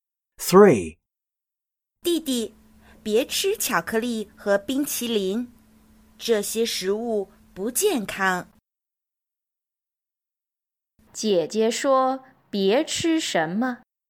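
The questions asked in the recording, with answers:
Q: 姐姐说别吃什么?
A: 巧克力和冰淇淋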